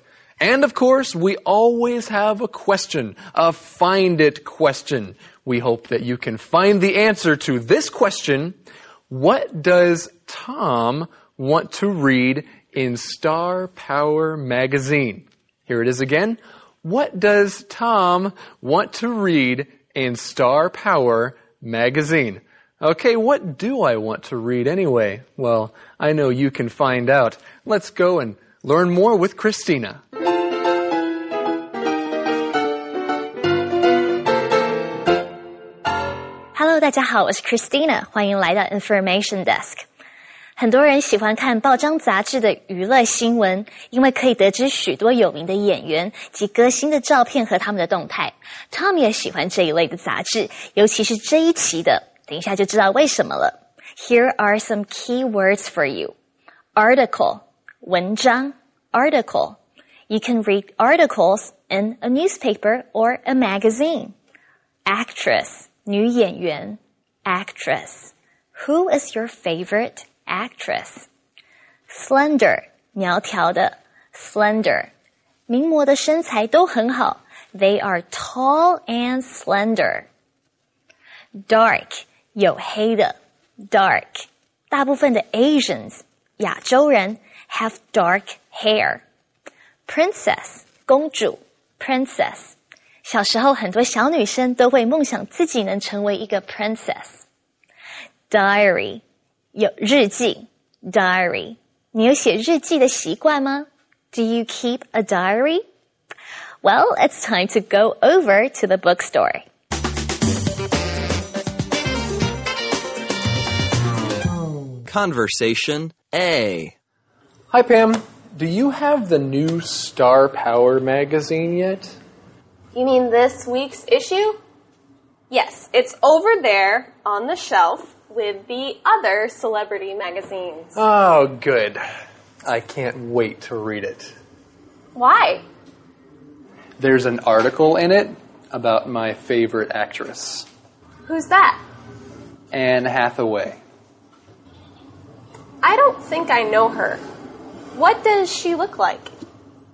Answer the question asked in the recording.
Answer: Tom wants to read an article about his favorite actress, Anne Hathaway.